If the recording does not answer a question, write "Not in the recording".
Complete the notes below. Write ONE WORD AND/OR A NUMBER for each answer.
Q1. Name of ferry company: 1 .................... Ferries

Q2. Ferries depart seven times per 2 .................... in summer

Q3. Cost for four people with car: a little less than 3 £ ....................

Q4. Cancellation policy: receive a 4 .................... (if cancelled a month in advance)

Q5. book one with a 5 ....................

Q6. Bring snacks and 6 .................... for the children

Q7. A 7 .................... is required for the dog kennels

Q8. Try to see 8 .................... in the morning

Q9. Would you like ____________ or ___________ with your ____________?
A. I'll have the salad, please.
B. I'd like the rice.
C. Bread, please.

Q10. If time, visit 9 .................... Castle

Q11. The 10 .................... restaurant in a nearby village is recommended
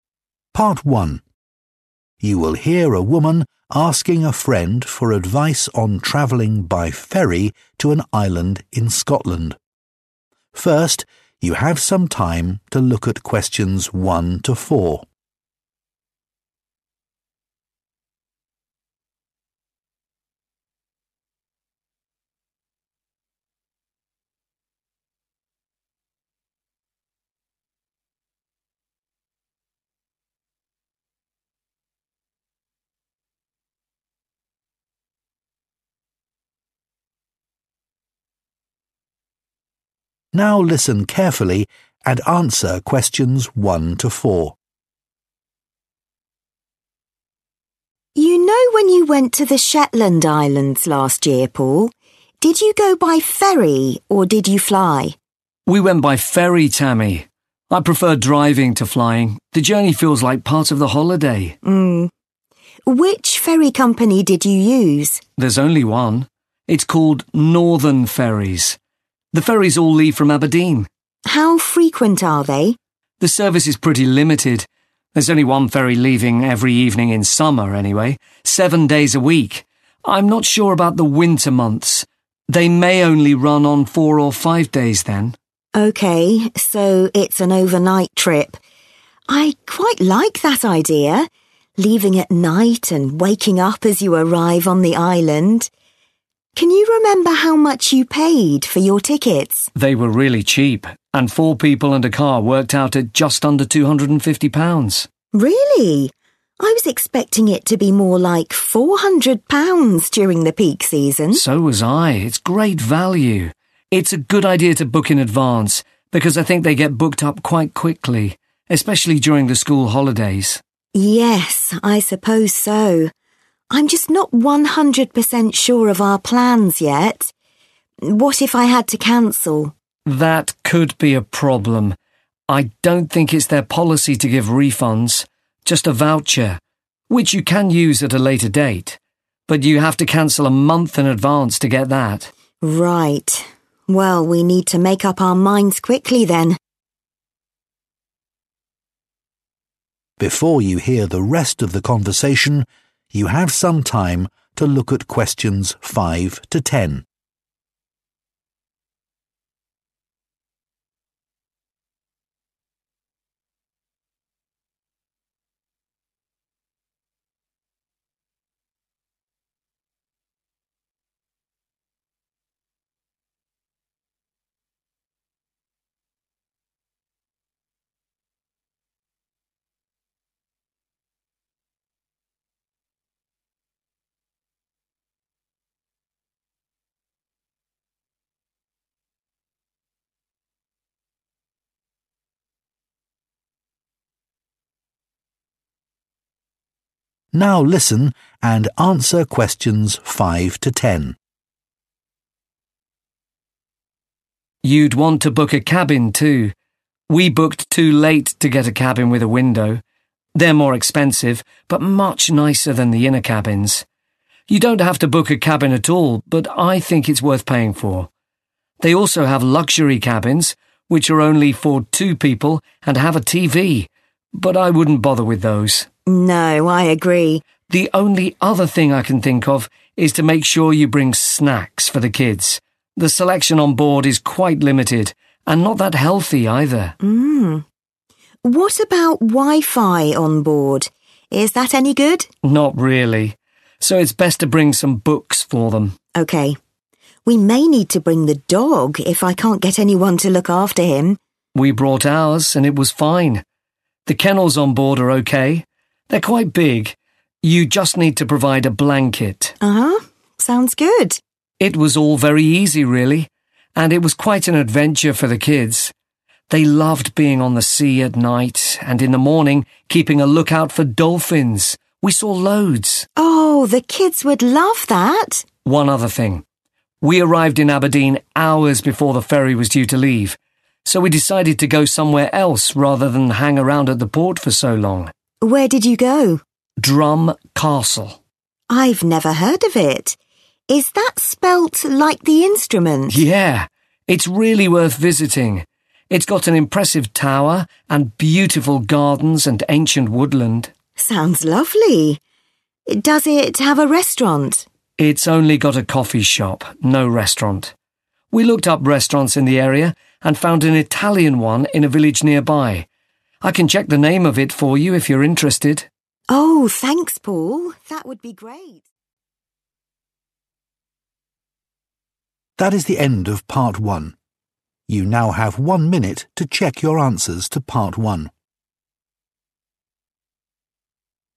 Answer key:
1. Northern
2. week
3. 250
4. voucher
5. window
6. books
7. blanket
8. dolphins
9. Not in the recording
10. Drum
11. Italian

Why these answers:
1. Theo như Paul nói về hãng tàu anh ấy đã đi năm ngoái đến Shetland Islands là của Northern Ferries.
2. Chỉ có đúng 1 phà xuất bến vào các buổi tối trong tuần vào mùa hè tức là 7 ngày trong tuần tương đương với 7 lần.
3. Giá vé khá rẻ cho 4 người cùng với 1 chiếc ô tô thì chỉ dưới 250 bảng. Nhưng Tammy thì nghĩ rằng giá sẽ là 400 bảng vào mùa cao điểm (peak season).
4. Trong trường hợp họ muốn huỷ thì Paul cho rằng ở đây không hoàn phí mà chỉ đưa voucher cho khách hàng với điều kiện là phải huỷ vé trước ít nhất 1 tháng.
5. Trong bài nghe dùng cấu trúc "You'd want to..." – là một cách diễn đạt tự nhiên hơn để đưa ra lời khuyên trong speaking. Paul khuyên Tammy nên đặt trước 1 cabin, và vì lần trước anh ấy đã đặt quá trễ để có thể đặt 1 chiếc cabin có cửa sổ → Paul khuyên Tammy cũng nên đặt 1 chiếc cabin như vậy (có cửa sổ).
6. Theo như audio, trên tàu không có wifi nên tốt nhất nên mang theo sách cho chúng. "Them" ở đây chỉ chủ ngữ gần nhất trước nó nên nó là "the children".
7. Vì Paul không thể tìm được ai trông chó cho anh ấy nên phải mang theo lên phà. Chuồng chó có sẵn trên tàu khá ok, khá rộng, chỉ cần bạn mang theo một chiếc chăn.
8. Ở đây đang nói về những đứa trẻ khi lên phà. Chúng rất thích ở trên biển vào buổi tối và vào buổi sáng thì canh chừng để được ngắm cá heo. Họ đã thấy rất nhiều. (loads)
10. Vì họ đã tới Aberdeen vài tiếng trước khi phà xuất bến nên họ đã quyết định ghé một nơi nào đó khác thay vì chỉ đi chơi vòng vòng ở cảng quá lâu.
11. Tammy hỏi về nhà hàng ở Drum Castle nhưng Paul trả lời rằng nó chỉ có quán cà phê. Paul cũng đã tìm hiểu về các nhà hàng ở trong khu vực đó và tìm thấy một nhà hàng Ý ở ngôi làng gần đó.

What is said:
Audio Introduction: Part 1. You will hear a woman asking a friend for advice on traveling by ferry to an island in Scotland. First, you have some time to look at questions 1 to 4. (Pause) Now listen carefully and answer questions 1 to 4.
Tammy: You know when you went to the Shetland Islands last year, Paul? Did you go by ferry or did you fly?
Paul: We went by ferry, Tammy. I prefer driving to flying. The journey feels like part of the holiday.
Tammy: Which ferry company did you use?
Paul: There's only one. It's called Northern Ferries. The ferries all leave from Aberdeen.
Tammy: How frequent are they?
Paul: The service is pretty limited. There's only one ferry leaving every evening in summer, anyway, 7 days a week. I'm not sure about the winter months. They may only run on 4 or 5 days then.
Tammy: Okay, so it's an overnight trip. I quite like that idea, leaving at night and waking up as you arrive on the island. Can you remember how much you paid for your tickets?
Paul: They were really cheap. And four people and a car worked out at just under £250.
Tammy: Really? I was expecting it to be more like £400 during the peak season.
Paul: So was I. It's great value. It's a good idea to book in advance because I think they get booked up quite quickly, especially during the school holidays.
Tammy: Yes, I suppose so. I'm just not 100% sure of our plans yet. What if I had to cancel?
Paul: That could be a problem. I don't think it's their policy to give refunds, just a voucher, which you can use at a later date. But you have to cancel a month in advance to get that.
Tammy: Right. Well, we need to make up our minds quickly then.
Audio Transition: Before you hear the rest of the conversation, you have some time to look at questions 5 to 10. (Pause) Now listen and answer questions 5 to 10.
Paul: You'd want to book a cabin too. We booked too late to get a cabin with a window. They're more expensive, but much nicer than the inner cabins. You don't have to book a cabin at all, but I think it's worth paying for. They also have luxury cabins, which are only for two people and have a TV, but I wouldn't bother with those.
Tammy: No, I agree.
Paul: The only other thing I can think of is to make sure you bring snacks for the kids. The selection on board is quite limited, and not that healthy either.
Tammy: What about Wi-Fi on board? Is that any good?
Paul: Not really. So it's best to bring some books for them.
We may need to bring the dog if I can't get anyone to look after him.
Paul: We brought ours and it was fine. The kennels on board are okay. They're quite big. You just need to provide a blanket.
Tammy: Uh-huh, sounds good.
Paul: It was all very easy really. And it was quite an adventure for the kids. They loved being on the sea at night, and in the morning keeping a lookout for dolphins. We saw loads.
Tammy: Oh, the kids would love that.
Paul: One other thing. We arrived in Aberdeen hours before the ferry was due to leave, so we decided to go somewhere else rather than hang around at the port for so long.
leave so we decided to go somewhere else rather than hang around at the port
for so long.
TAMMY: I've never heard of it. Is that spelt like the instrument?
restaurant in a nearby village is recommended.
PAUL: Yeah. It's really worth visiting. It's got an impressive tower and beautiful gardens
and ancient woodland.
TAMMY: Sounds lovely. Does it have a restaurant?
PAUL: It's only got a coffee shop – no restaurant. We looked up restaurants in the area and found an Italian one in a village nearby. I can check the name of it for you if
you're interested.
TAMMY: Oh thanks Paul that would be ....